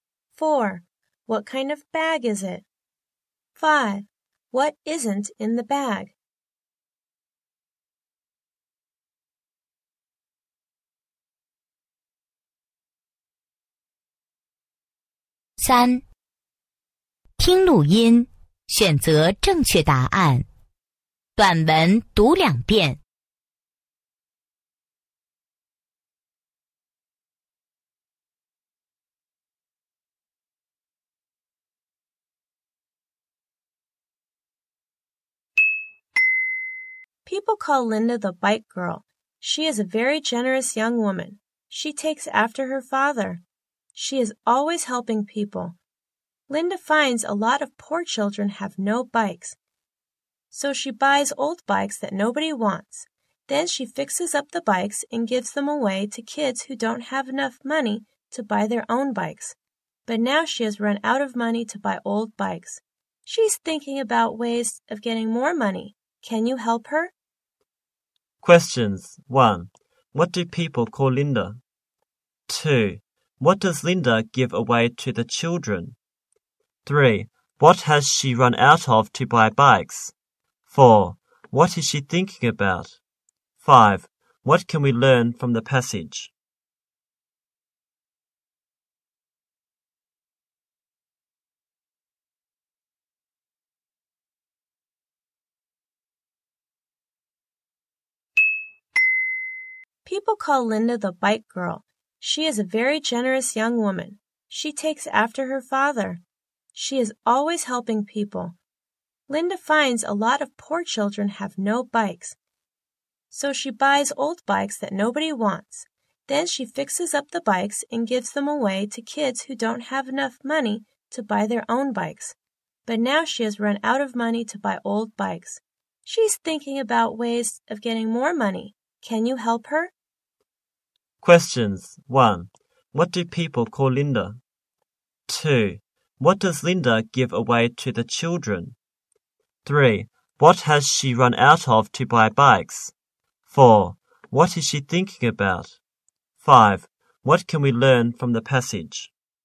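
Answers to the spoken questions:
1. The bike girl
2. Bikes she has fixed up
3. Money
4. Ways of getting more money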